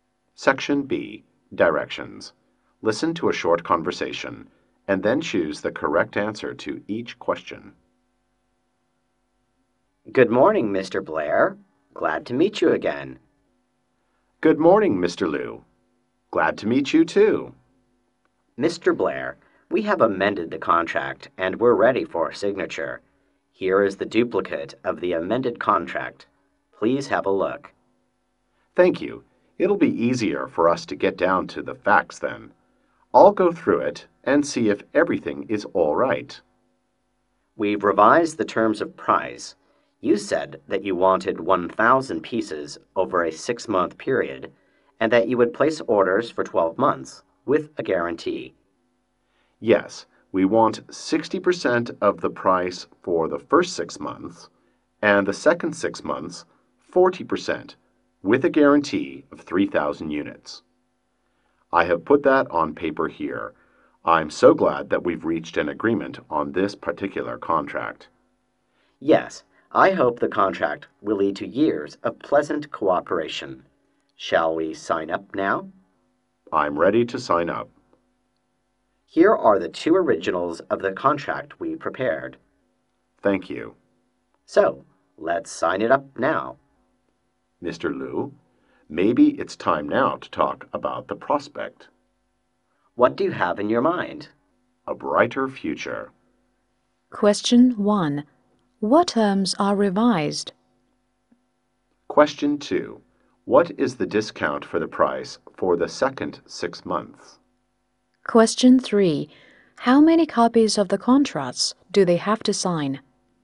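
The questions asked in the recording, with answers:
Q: What terms are revised?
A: The terms of price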